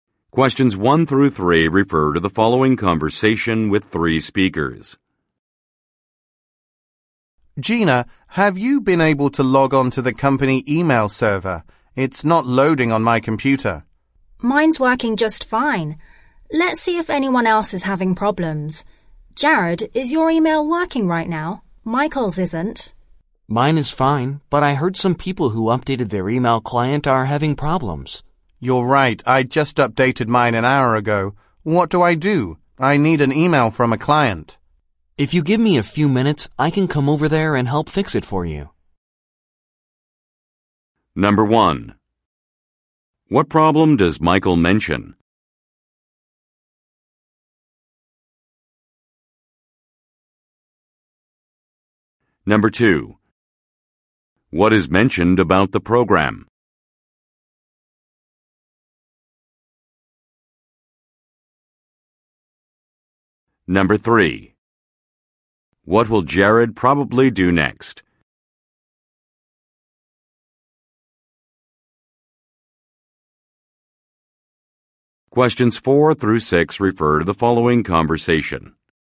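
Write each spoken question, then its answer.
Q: What problem does Michael mention?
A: His company email is not loading on his computer.

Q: What is mentioned about the program?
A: People who updated the email client are having problems.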